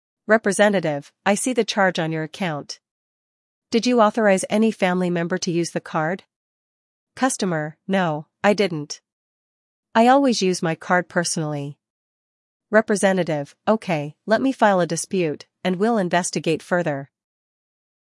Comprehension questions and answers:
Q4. What does the representative suggest as a possible reason for the charge?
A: Family member use

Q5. How does the customer respond?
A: No, the card is personal

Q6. What action will the representative take next?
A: File a dispute

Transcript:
Representative: I see the charge on your account. Did you authorize any family member to use the card?
Customer: No, I didn't. I always use my card personally.
Representative: Okay, let me file a dispute, and we'll investigate further.